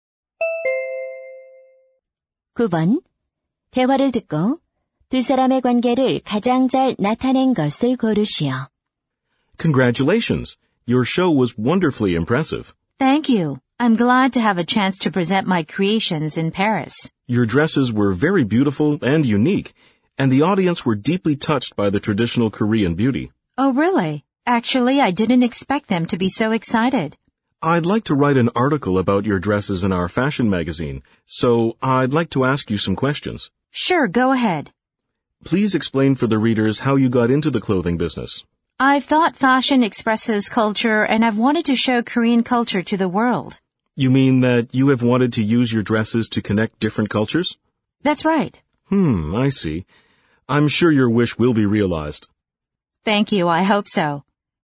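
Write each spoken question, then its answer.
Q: 대화를 듣고 두 사람의 관계를 가장 잘 나타낸 것을 고르시오.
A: 패션 잡지 기자 - 디자이너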